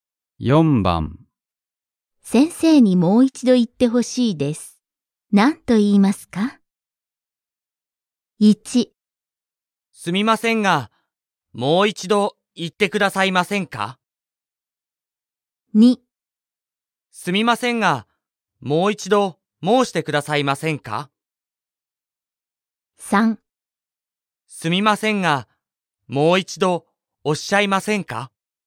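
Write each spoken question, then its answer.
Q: 先生にもう一度言ってほしいです。何と言いますか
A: 1: すみませんが、もう一度言ってくださいませんか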